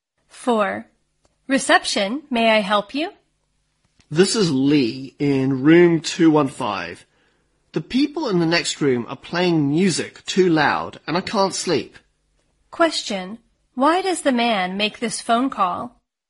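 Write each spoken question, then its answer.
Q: Why does the man make this phone call?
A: To complain that the people next door are playing music too loud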